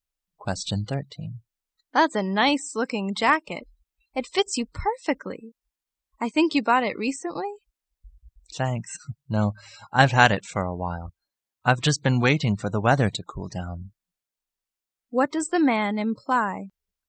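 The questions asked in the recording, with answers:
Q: What does the man imply?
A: He has had the jacket for a while and waited for cooler weather to wear it.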